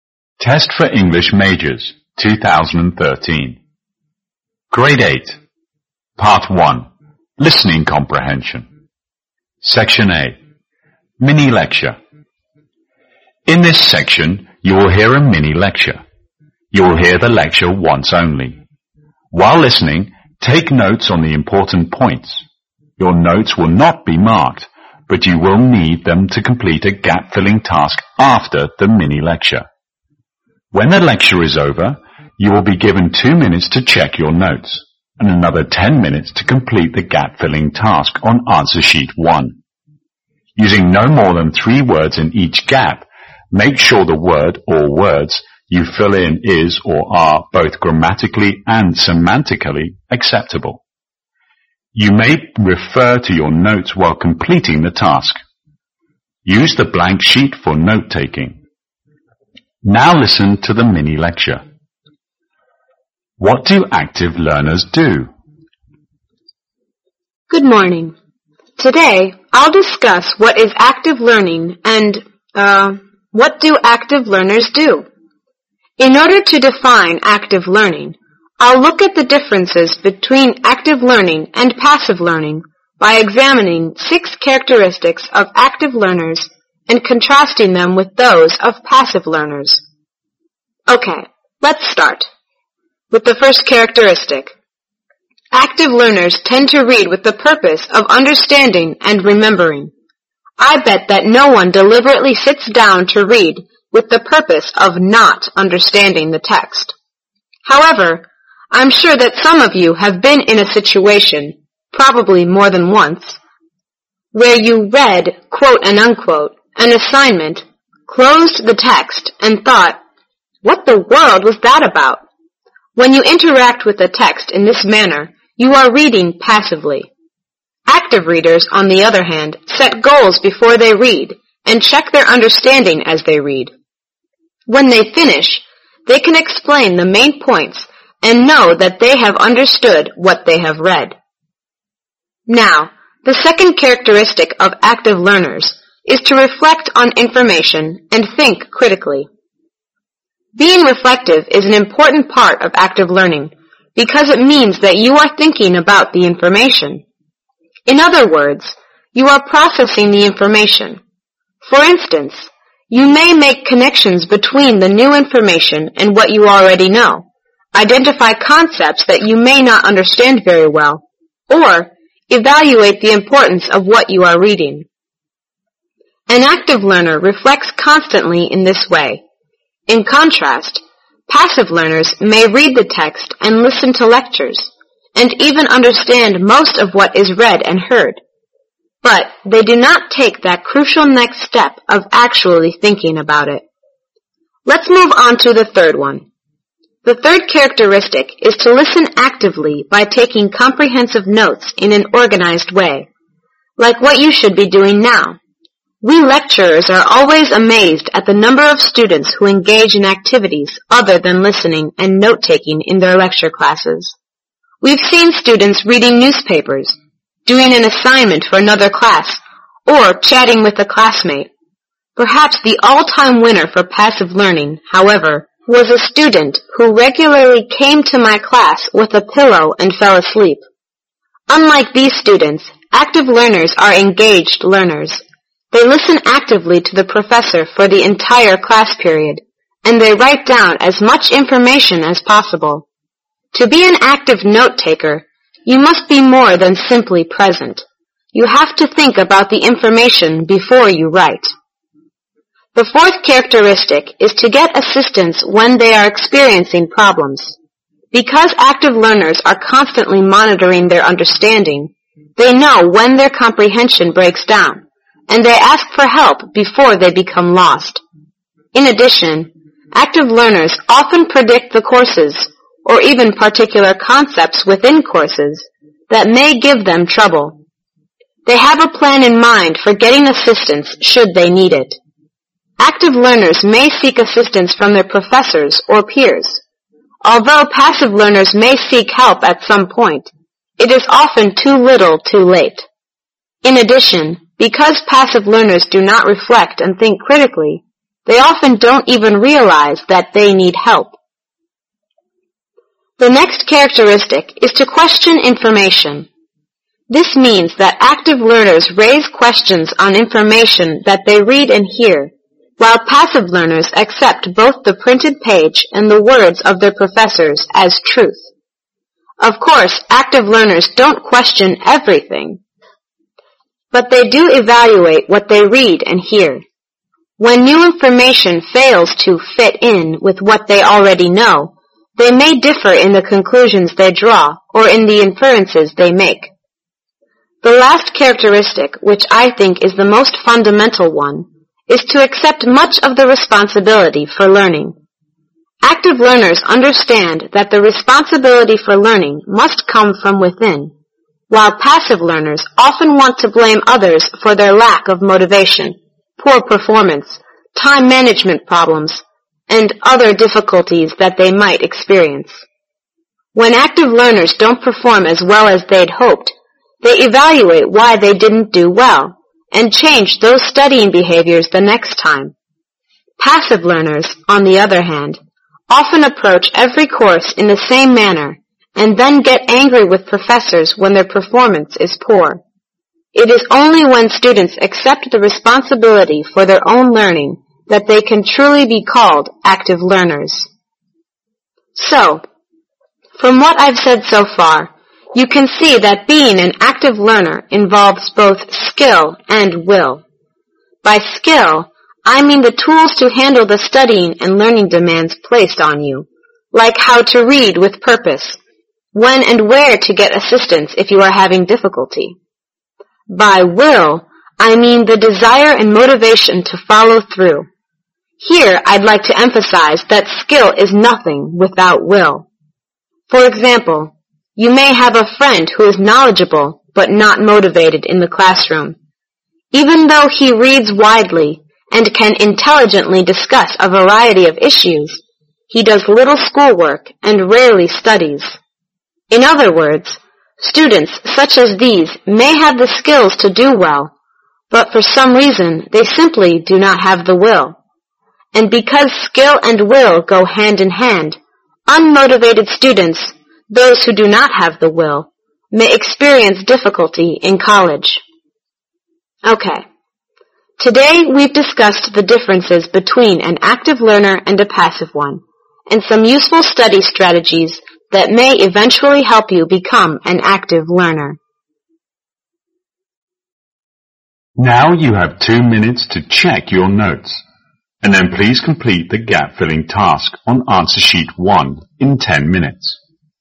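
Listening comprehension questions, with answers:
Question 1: B. while reading: (1)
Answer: checking understanding

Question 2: II. (2)and critical in thinking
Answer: reflective

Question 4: -judgment on the value of (4)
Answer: reading material

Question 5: A. ways of note-taking: (5)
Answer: comprehensive and organized

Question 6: A. reason 1: knowing comprehension problems because of (6)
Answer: constant monitoring

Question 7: B. evaluate and (7)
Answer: draw conclusions

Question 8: -passive learners: (8)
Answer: blame others

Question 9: B. attitude toward (9)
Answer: poor performance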